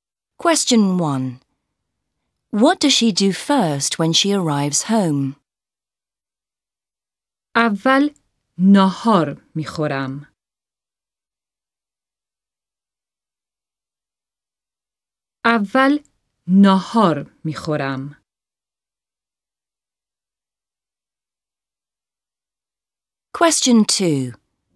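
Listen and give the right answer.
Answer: She eats lunch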